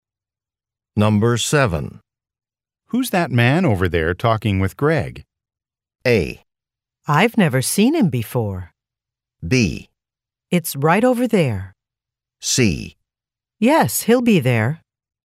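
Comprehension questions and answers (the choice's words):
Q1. Who's that man over there talking with Greg?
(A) I've never seen him before.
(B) It's right over there.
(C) Yes, he'll be there.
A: I've never seen him before.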